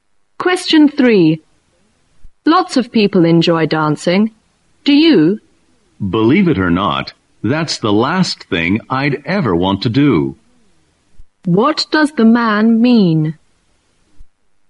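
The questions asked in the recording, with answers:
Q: What does the man mean?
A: He doesn't like dancing at all.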